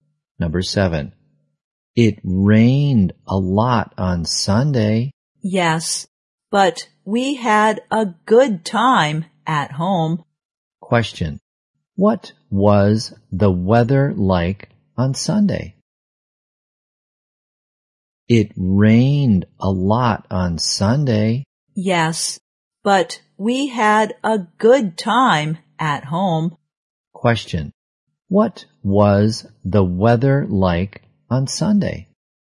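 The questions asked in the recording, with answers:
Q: what was the weather like on Sunday?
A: Rainy.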